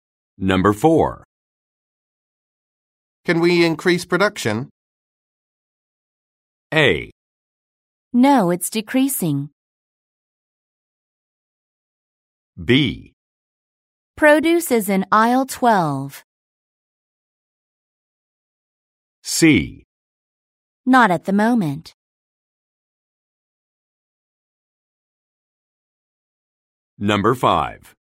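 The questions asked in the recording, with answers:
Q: Can we increase production?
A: C: Not at the moment.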